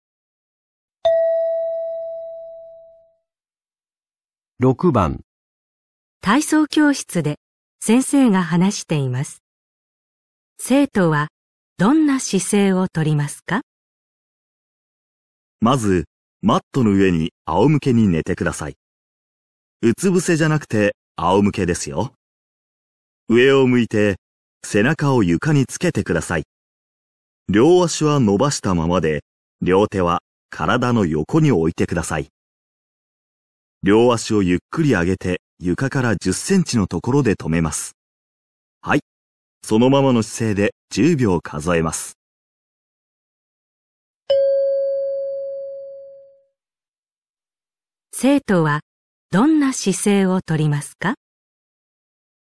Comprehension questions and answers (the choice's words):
問題1 では、まず質問を聞いてください。それから話を聞いて、用紙の1から4の中から、最もよいものを一つ選んでください。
生徒はどんな姿勢をとりますか。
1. 床にうつぶせして、両手は伸ばしたままで、両足は床につける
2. マットにうつぶせに寝て、背中を床につけて両手をゆっくりあげる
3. 仰向けに寝って、背中を床につけて両足をあげる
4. 下に向いて、両足は伸ばしたままでゆっくりあげる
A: 仰向けに寝って、背中を床につけて両足をあげる

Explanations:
原文中老师说,仰躺在垫子上,面朝上,后背贴地,两腿伸直,两手放在身边,两腿慢慢抬起至离地10公分的地方停下。综上所述,应该选3。

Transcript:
体操教室で先生が話しています。生徒はどんな姿勢をとりますか。
まずマットの上に仰向けに寝てください。
うつ伏せじゃなくて、仰向けですよ。
上を向いて、背中を床につけてください。
両足は伸ばしたままで、両手は体の横に置いてください。
両足をゆっくり上げて床から10センチのところで止めます。
はい、そのままの姿勢で10秒数えます。

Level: N3